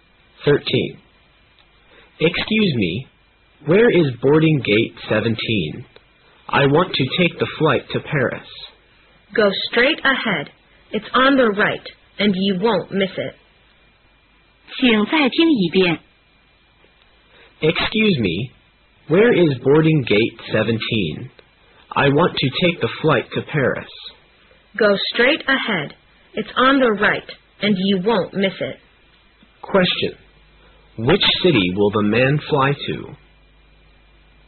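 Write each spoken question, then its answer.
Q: Which city will the man fly to?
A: Paris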